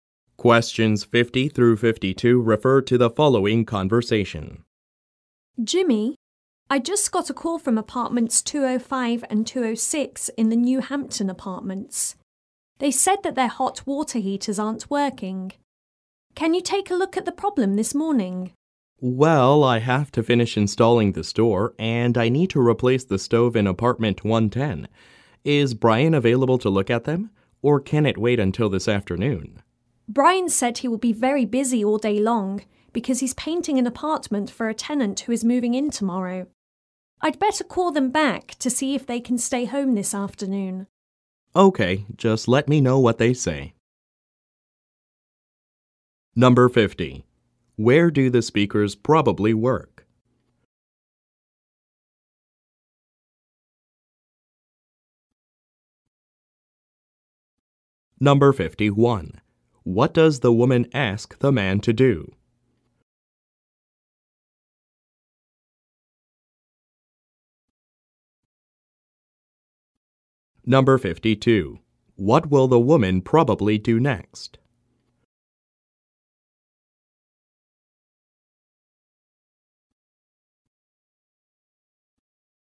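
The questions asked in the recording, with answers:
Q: Where do the speakers probably work?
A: At an apartment complex (building maintenance)

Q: What does the woman ask the man to do?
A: Look at broken hot water heaters this morning

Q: What will the woman probably do next?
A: Call the tenants back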